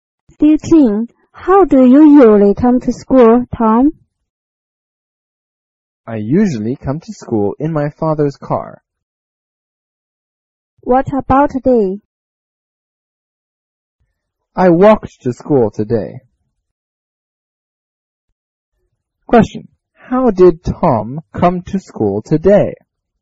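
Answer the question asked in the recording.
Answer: On foot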